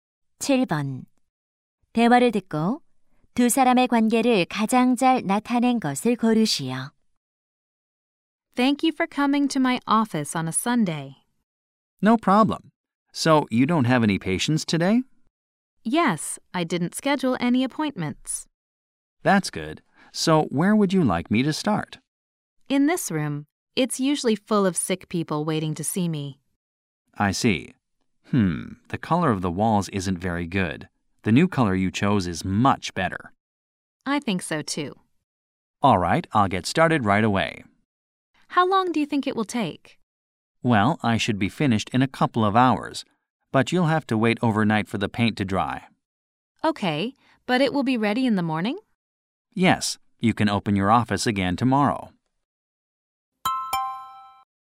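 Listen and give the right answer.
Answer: 의사 - 페인트공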